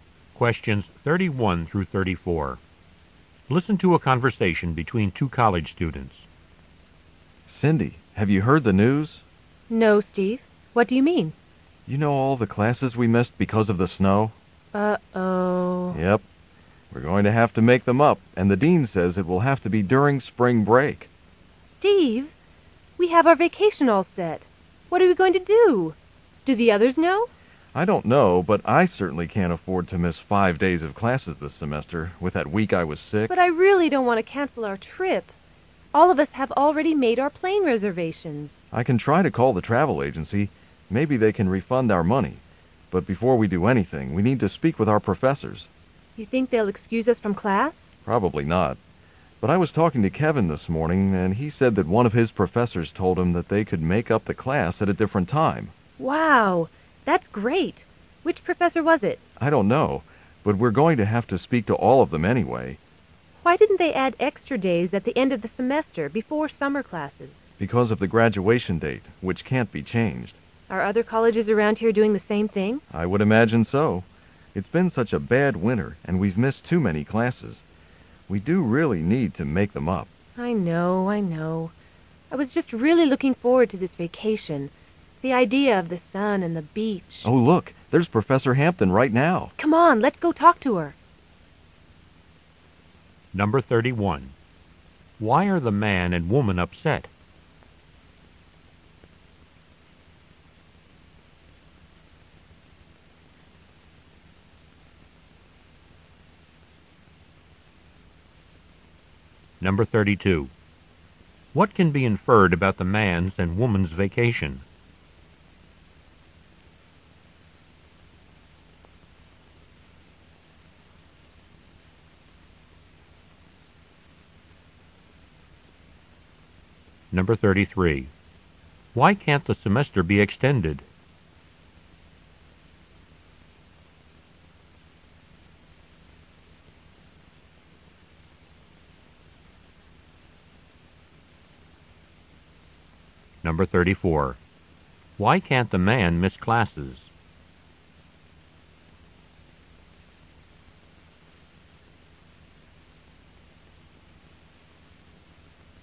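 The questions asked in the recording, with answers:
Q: Why are the man and woman upset?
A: They must make up missed classes during spring break

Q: What can be inferred about the man's and woman's vacation?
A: They had already made plane reservations for a beach trip

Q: Why can't the semester be extended?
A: The graduation date can't be changed

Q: Why can't the man miss classes?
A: He already missed a week when he was sick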